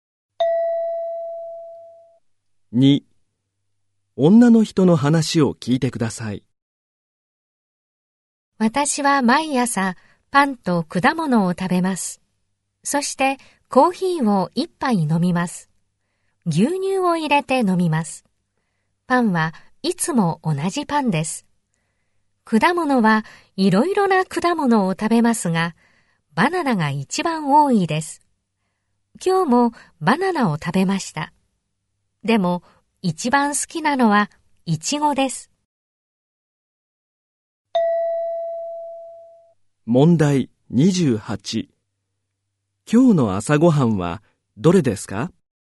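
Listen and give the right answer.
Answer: イチゴ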